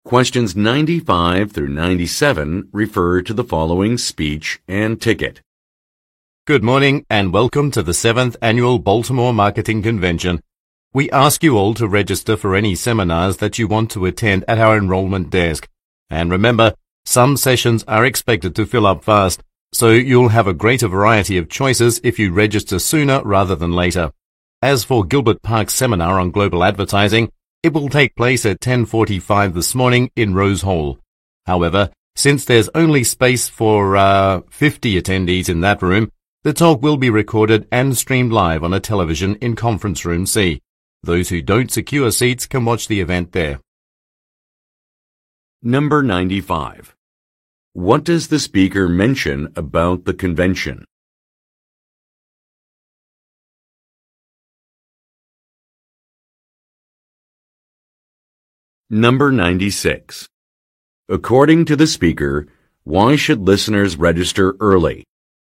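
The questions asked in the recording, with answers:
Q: According to the speaker, why should listeners register early?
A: To have a greater variety of seminar choices, since some sessions fill up fast.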